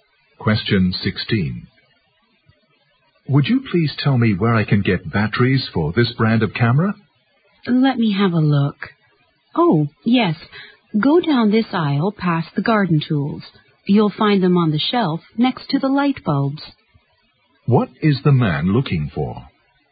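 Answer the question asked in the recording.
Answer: Camera batteries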